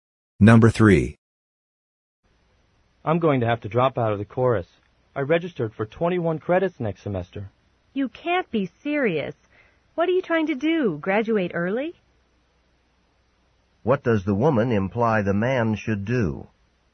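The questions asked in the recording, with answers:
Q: What does the woman imply the man should do?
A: Register for fewer credits next semester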